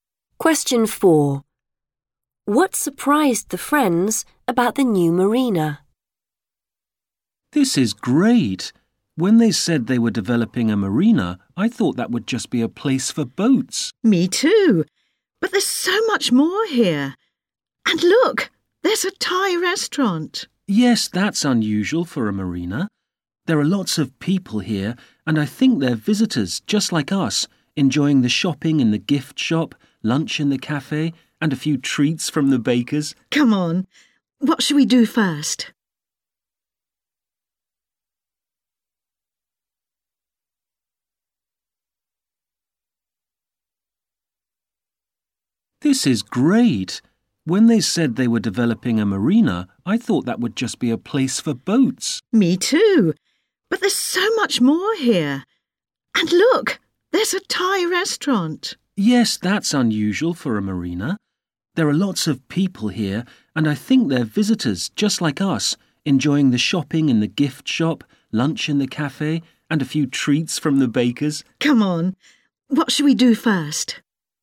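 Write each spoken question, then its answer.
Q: What surprised the friends about the new marina?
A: It is more than a place for boats: it has a Thai restaurant, shops, a cafe and a bakery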